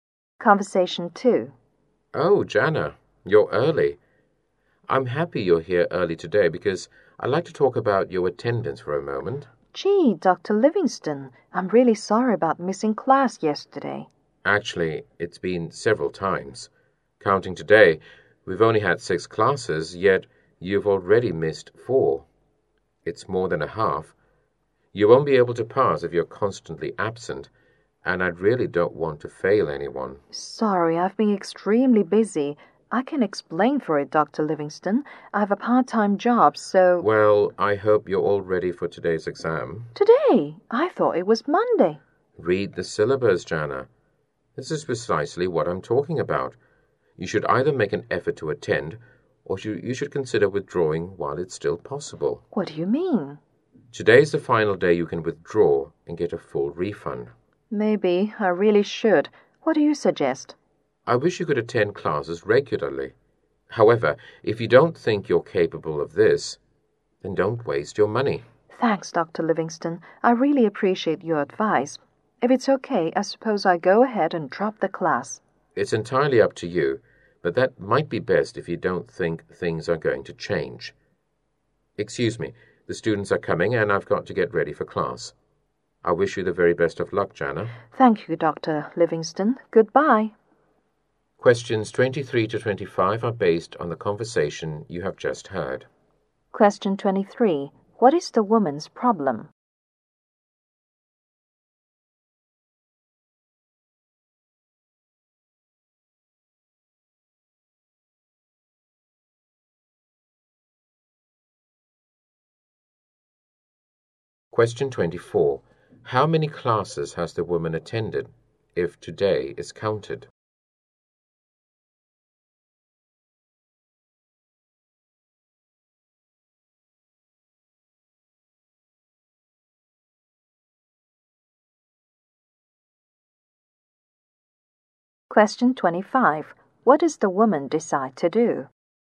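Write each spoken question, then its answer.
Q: What is the woman's problem?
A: She has missed too many classes.

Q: How many classes has the woman attended, if today is counted?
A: Two.

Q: What does the woman decide to do?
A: Drop (withdraw from) the class.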